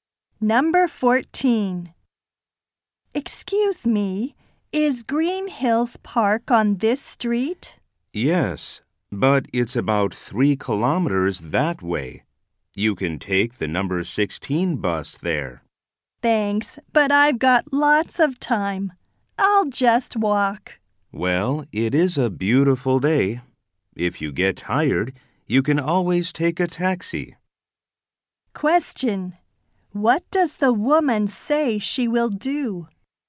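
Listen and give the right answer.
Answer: Walk to Green Hills Park.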